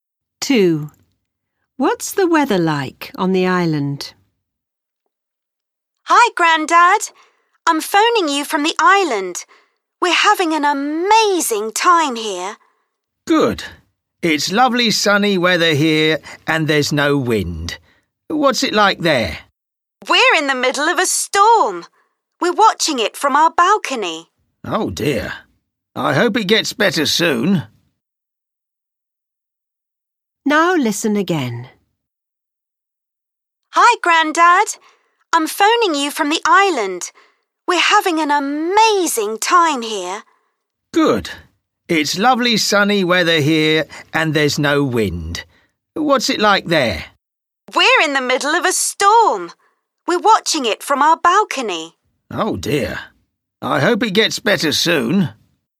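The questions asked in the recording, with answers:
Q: What's the weather like on the island?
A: Stormy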